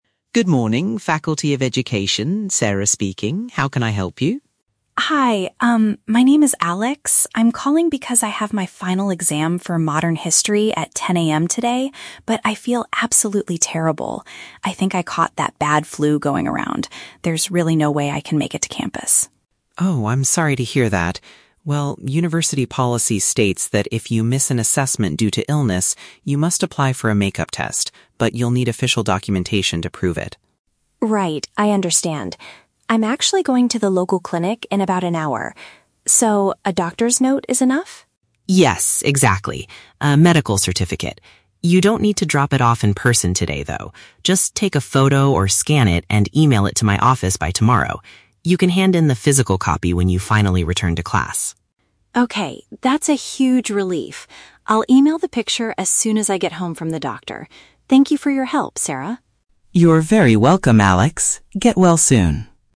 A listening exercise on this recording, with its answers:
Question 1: Why is the student calling the faculty office?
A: To report that he is too sick to attend his morning exam.

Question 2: What does the secretary tell the student to do today?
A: Send a digital copy of the paper from the doctor.

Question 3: When does the student plan to send the required document?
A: Right after he finishes his medical appointment.

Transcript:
Secretary: "Good morning, Faculty of Education, Sarah speaking. How can I help you?"
Student: "Hi, um, my name is Alex. I'm calling because I have my final exam for Modern History at 10 AM today, but I feel absolutely terrible. I think I caught that bad flu going around. There's really no way I can make it to campus."
Secretary: "Oh, I'm sorry to hear that. Well, university policy states that if you miss an assessment due to illness, you must apply for a make-up test. But you'll need official documentation to prove it."
Student: "Right, I understand. I'm actually going to the local clinic in about an hour. So, a doctor's note is enough?"
Secretary: "Yes, exactly. A medical certificate. You don't need to drop it off in person today, though. Just take a photo or scan it, and email it to my office by tomorrow. You can hand in the physical copy when you finally return to class."
Student: "Okay, that's a huge relief. I'll email the picture as soon as I get home from the doctor. Thank you for your help, Sarah."
Secretary: "You're very welcome, Alex. Get well soon."